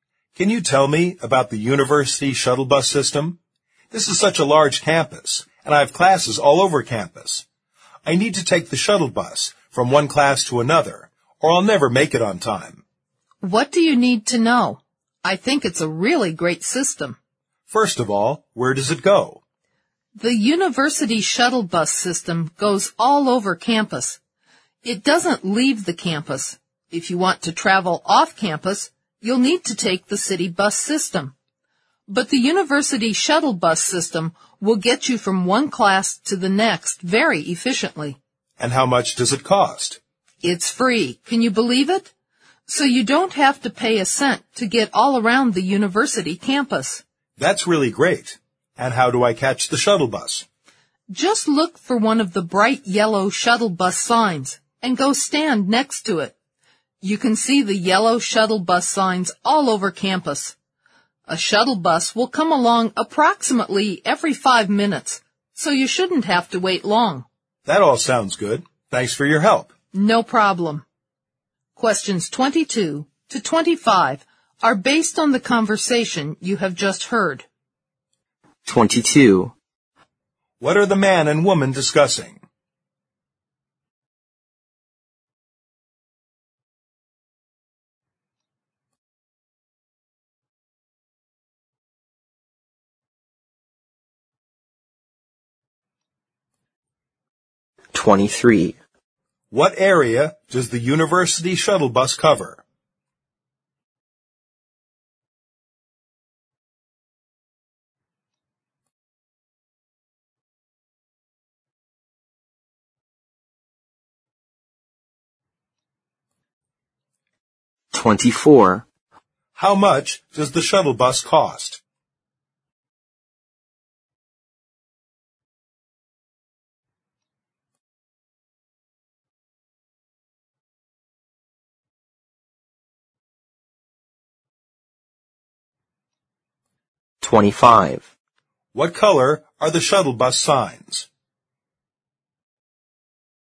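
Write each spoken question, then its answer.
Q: What are the man and woman discussing?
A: The university shuttle bus system

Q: What area does the university shuttle bus cover?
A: All over campus, but not off campus

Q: How much does the shuttle bus cost?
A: It's free

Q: What color are the shuttle bus signs?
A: Bright yellow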